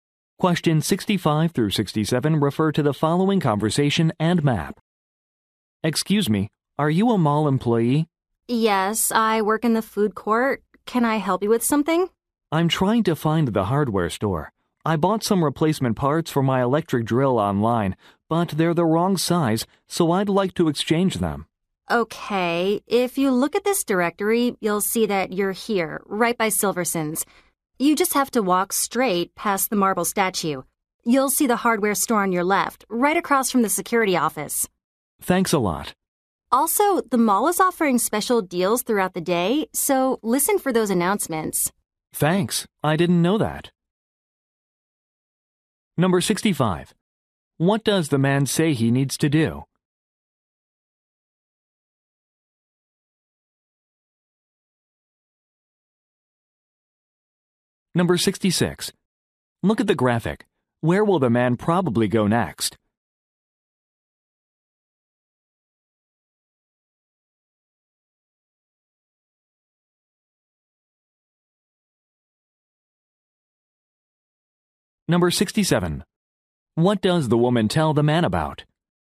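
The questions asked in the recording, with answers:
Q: What does the man say he needs to do?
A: Exchange drill parts that are the wrong size

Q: What does the woman tell the man about?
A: Special deals being offered in the mall throughout the day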